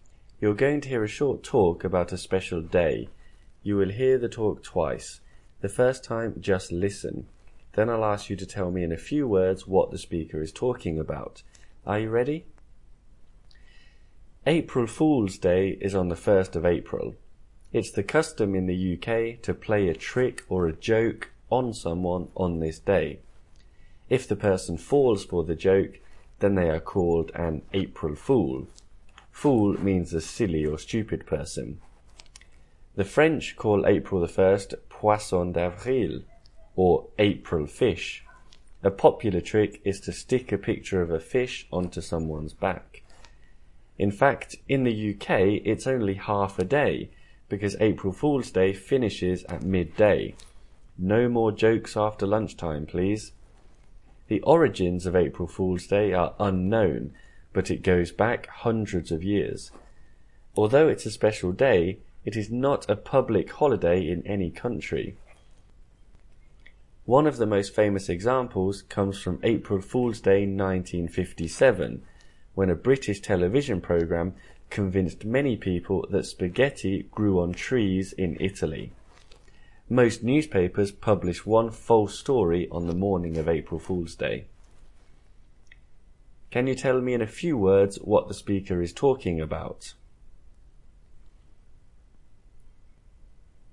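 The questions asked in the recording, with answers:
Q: Can you tell me in a few words what the speaker is talking about?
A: April Fool's Day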